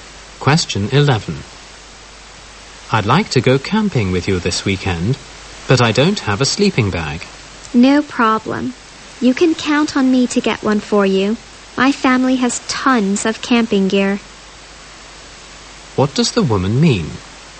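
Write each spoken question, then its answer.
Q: What does the woman mean?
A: She will get a sleeping bag for the man.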